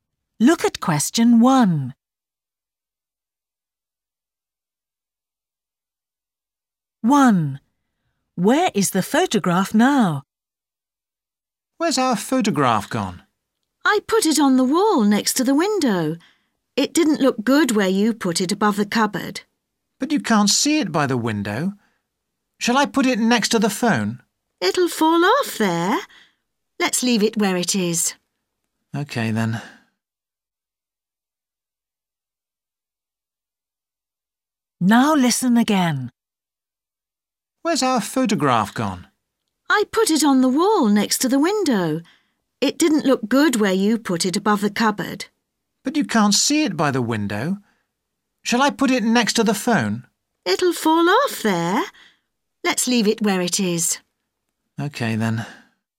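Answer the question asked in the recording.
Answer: On the wall next to the window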